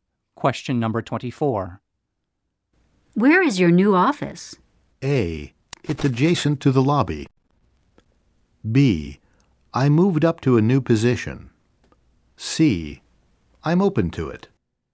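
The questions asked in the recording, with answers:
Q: Where is your new office?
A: A: It's adjacent to the lobby.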